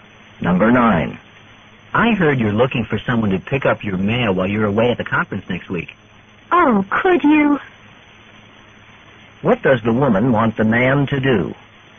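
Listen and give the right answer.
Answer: Pick up her mail while she is away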